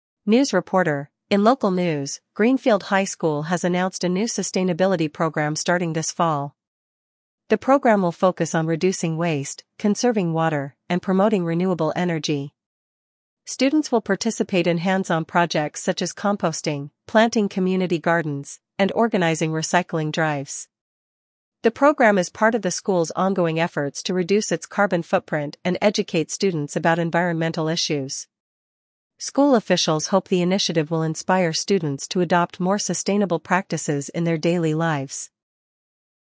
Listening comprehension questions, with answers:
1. What is the new program at Greenfield High School focused on?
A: Sustainability

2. What activities will students be involved in as part of the program?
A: Composting, gardening, and recycling

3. What is the goal of the sustainability program?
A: To teach students about environmental issues

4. What do school officials hope the program will inspire?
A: Students to adopt more sustainable practices

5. When will the sustainability program start?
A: In the fall

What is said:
News Reporter: "In local news, Greenfield High School has announced a new sustainability program starting this fall. The program will focus on reducing waste, conserving water, and promoting renewable energy. Students will participate in hands-on projects such as composting, planting community gardens, and organizing recycling drives. The program is part of the school's ongoing efforts to reduce its carbon footprint and educate students about environmental issues. School officials hope the initiative will inspire students to adopt more sustainable practices in their daily lives."